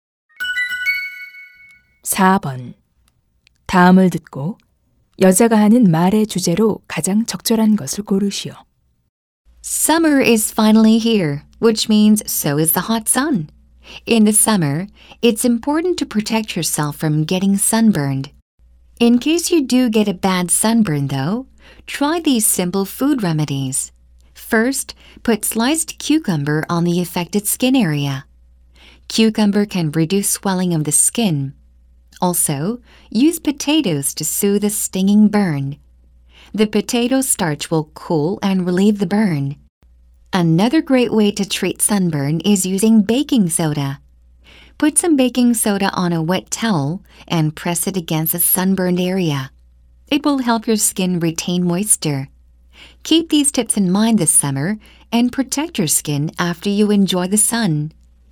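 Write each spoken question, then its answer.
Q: 다음을 듣고 여자가 하는 말의 주제로 가장 적절한 것을 고르시오.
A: 음식을 이용한 햇볕 화상 치료법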